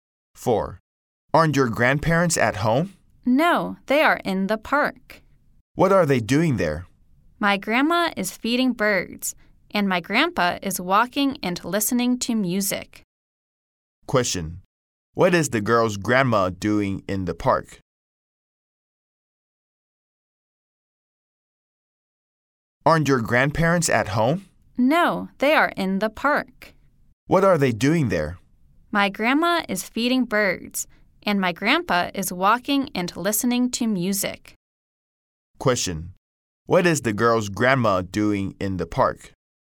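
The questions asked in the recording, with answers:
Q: What is the girl's grandma doing in the park?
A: She is feeding birds.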